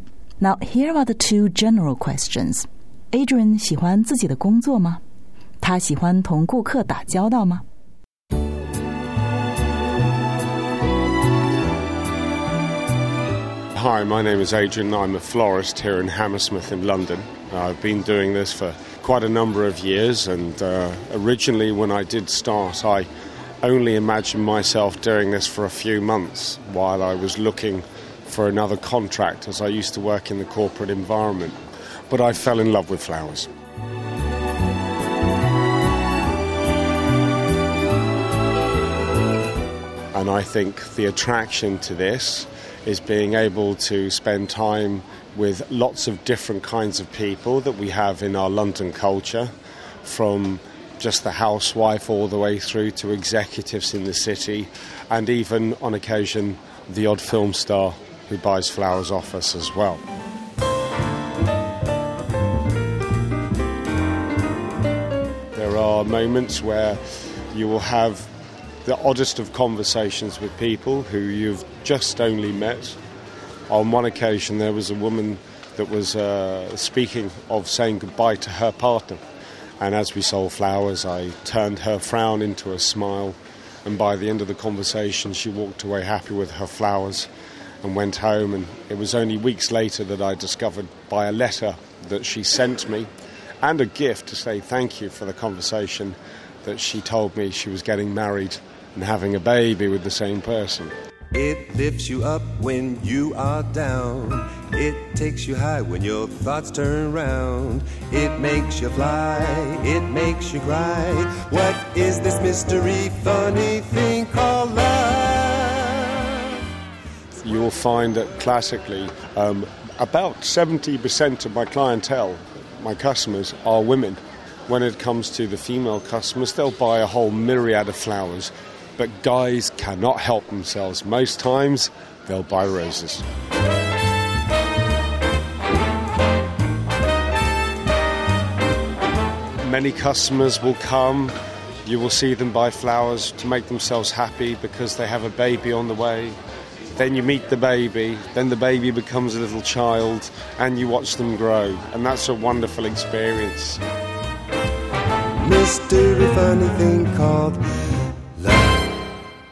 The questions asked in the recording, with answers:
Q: Adrian 喜欢自己的工作吗?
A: 回答是肯定的 Yes, he loves his job

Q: 他喜欢同顾客打交道吗?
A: 回答也是肯定的。